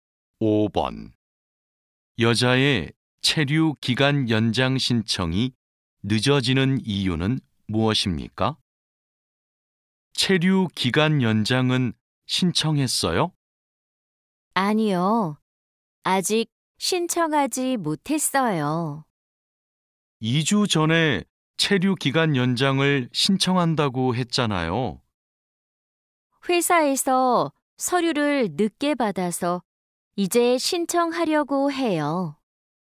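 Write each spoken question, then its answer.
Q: 여자의 체류 기간 연장 신청이 늦어지는 이유는 무엇입니까?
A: 회사에서 서류를 늦게 받아서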